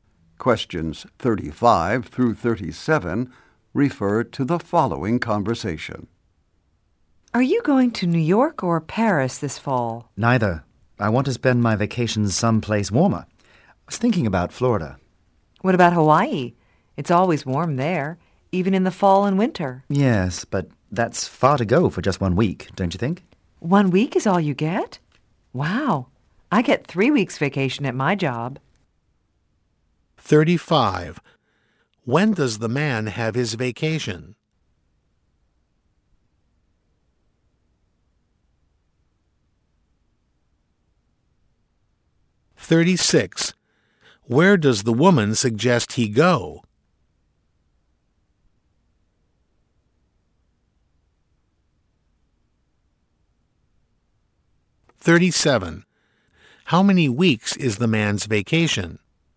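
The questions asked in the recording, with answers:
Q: When does the man have his vacation?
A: In the fall

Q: Where does the woman suggest he go?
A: Hawaii

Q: How many weeks is the man's vacation?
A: One week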